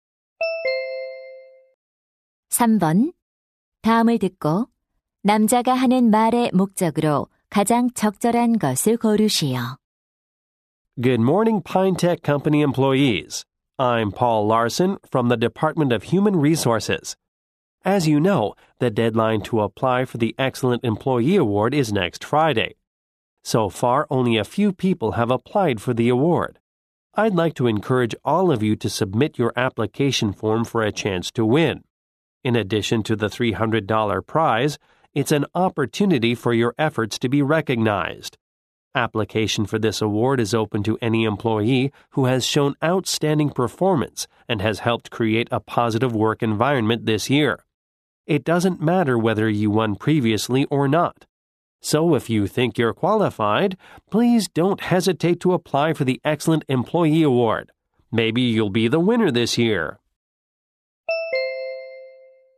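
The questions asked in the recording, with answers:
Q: 다음을 듣고 남자가 하는 말의 목적으로 가장 적절한 것을 고르시오.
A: 우수 사원상에 지원할 것을 독려하려고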